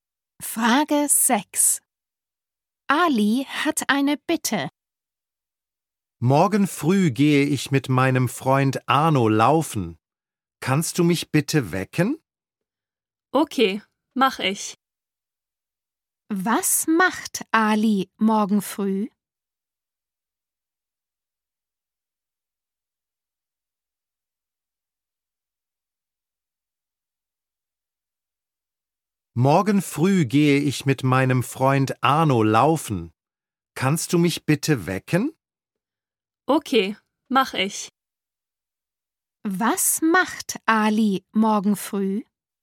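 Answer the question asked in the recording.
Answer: Er geht mit Arno laufen.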